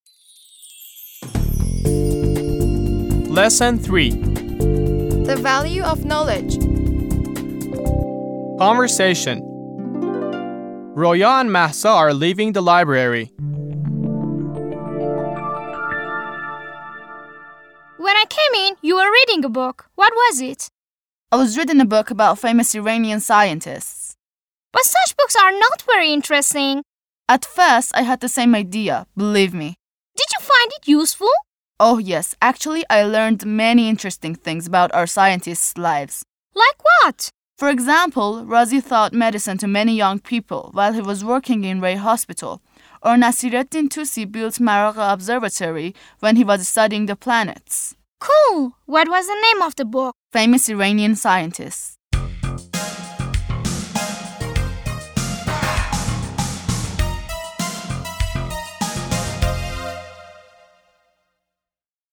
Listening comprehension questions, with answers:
Answer the following questions orally.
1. Were Mahsa and Roya in a laboratory?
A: No, the were leaving the library.

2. Who came to the library sooner, Mahsa or Roya?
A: Mahsa came to the library sooner.

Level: زبان دهم